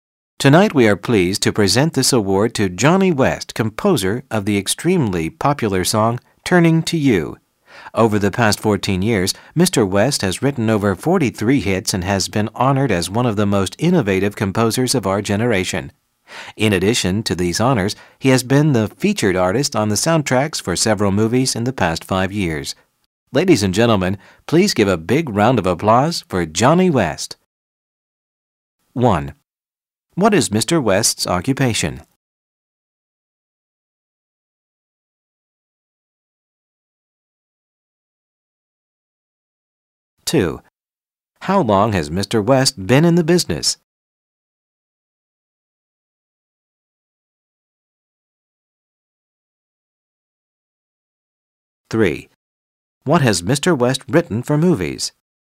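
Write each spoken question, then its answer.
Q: What is Mr. West's occupation?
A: Composer

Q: How long has Mr. West been in the business?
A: 14 years

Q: What has Mr. West written for movies?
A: Soundtracks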